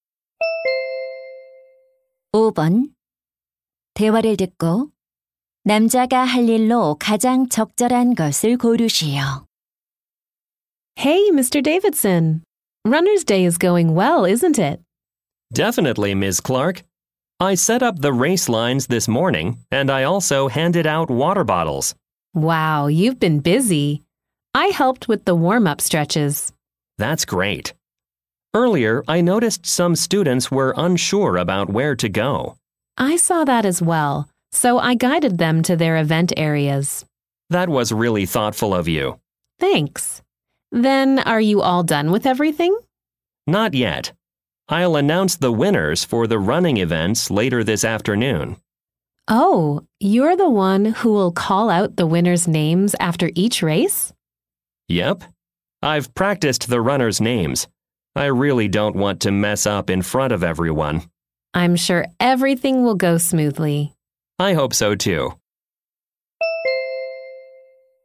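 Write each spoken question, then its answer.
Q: 대화를 듣고 남자가 할 일로 가장 적절한 것을 고르시오.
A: 달리기 종목 우승자 발표하기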